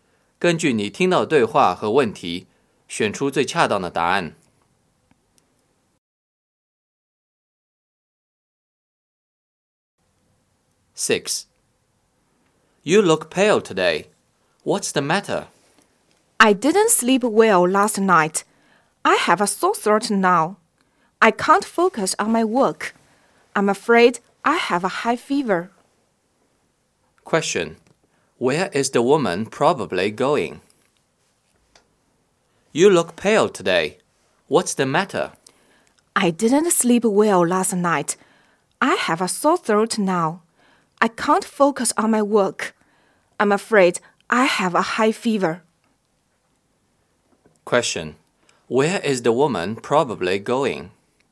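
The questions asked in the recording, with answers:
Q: Where is the woman probably going?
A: To the hospital (to see a doctor)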